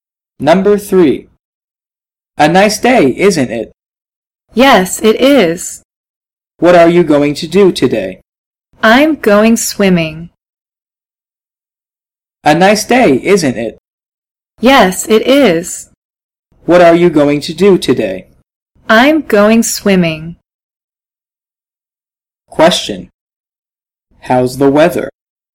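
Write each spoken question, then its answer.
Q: How's the weather?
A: It's a nice day.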